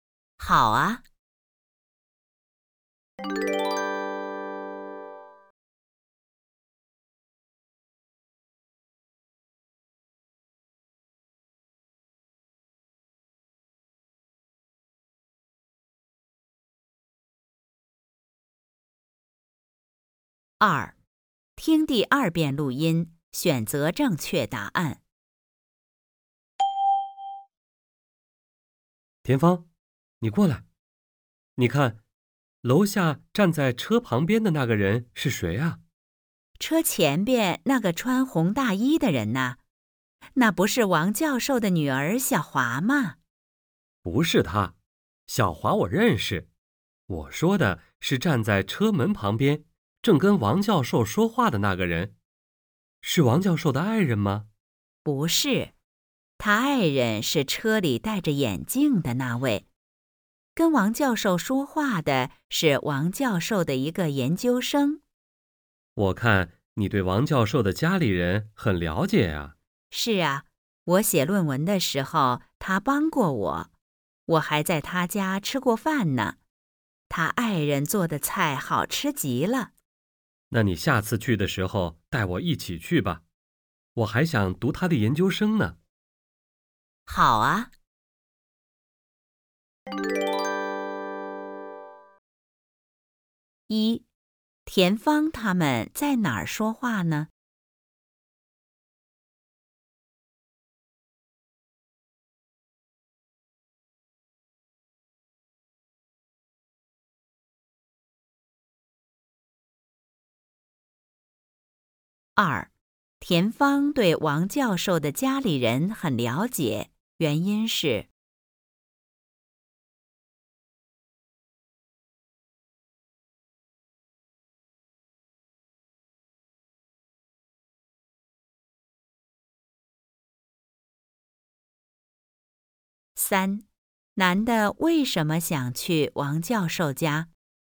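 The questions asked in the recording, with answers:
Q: 田芳对王教授的家里人很了解,原因是。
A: 写论文的时候王教授帮过她,她还在王教授家吃过饭

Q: 男的为什么想去王教授家?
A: 他想读王教授的研究生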